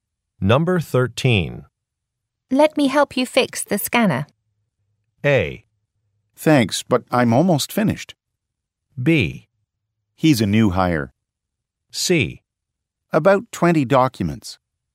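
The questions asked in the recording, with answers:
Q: Let me help you fix the scanner.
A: A: Thanks, but I'm almost finished.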